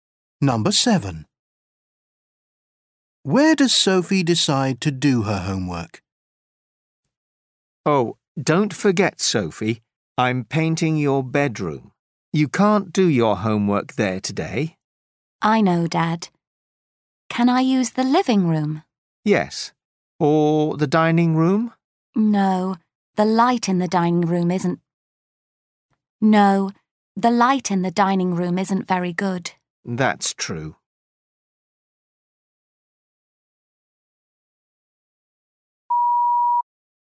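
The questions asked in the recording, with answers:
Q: Where does Sophie decide to do her homework?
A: In the living room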